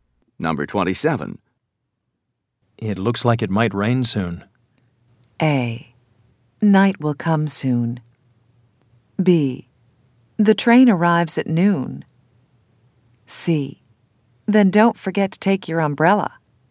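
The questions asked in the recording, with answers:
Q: It looks like it might rain soon.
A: C: Then don't forget to take your umbrella.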